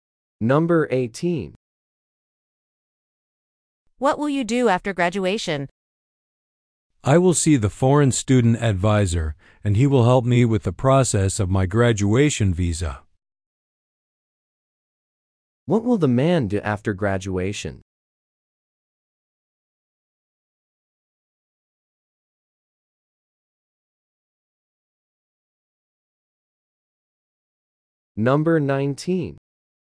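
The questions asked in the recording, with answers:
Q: What will the man do after graduation?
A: See the foreign student advisor about his visa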